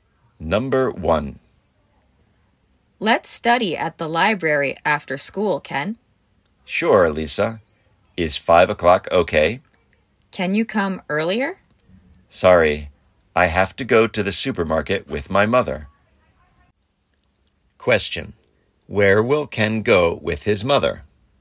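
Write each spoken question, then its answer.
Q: Where will Ken go with his mother?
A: To the supermarket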